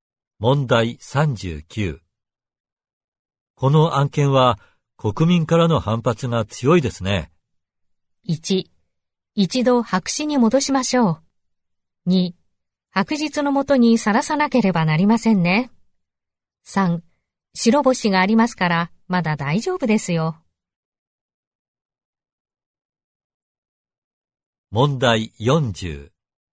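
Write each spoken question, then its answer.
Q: この案件は国民からの反発が強いですね。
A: 1: 一度白紙に戻しましょう。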